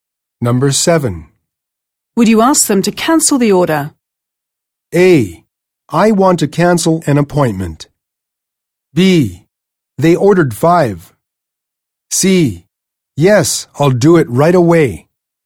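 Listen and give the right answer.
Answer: C: Yes, I'll do it right away.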